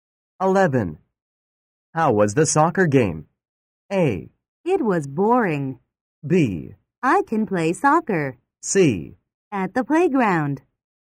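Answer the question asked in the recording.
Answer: A: It was boring.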